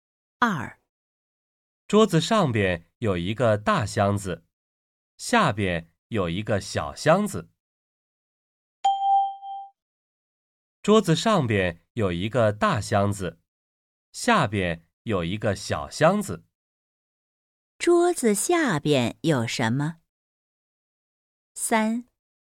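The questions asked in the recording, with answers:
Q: 桌子下边有什么?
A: 一个小箱子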